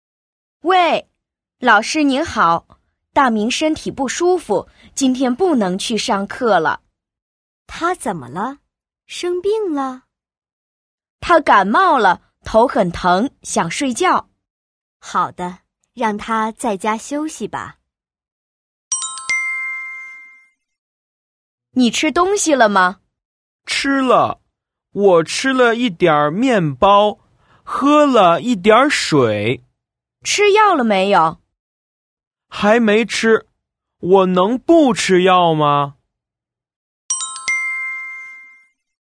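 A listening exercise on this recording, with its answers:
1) 大明怎么了?/Dàmíng zěnme le?/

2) 他吃了什么?他吃药了吗?/Tā chīle shénme? Tā chī yào le ma?/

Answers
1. 他感冒了,头很疼,想睡觉。
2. 他吃了一点儿面包,喝了一点儿水;还没吃药。

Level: YCT 4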